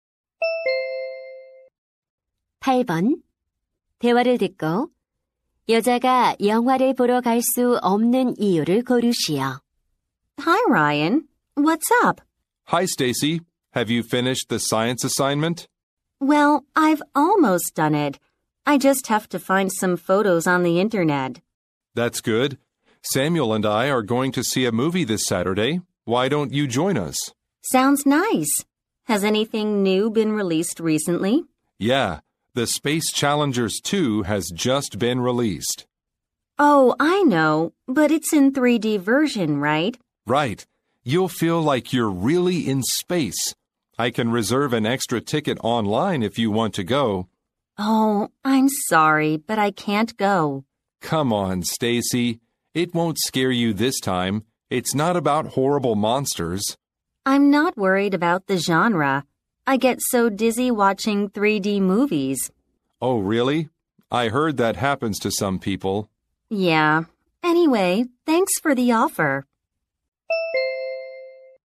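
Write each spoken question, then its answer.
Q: 대화를 듣고 여자가 영화를 보러 갈 수 없는 이유를 고르시오.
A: 3D 영화를 보면 어지러워서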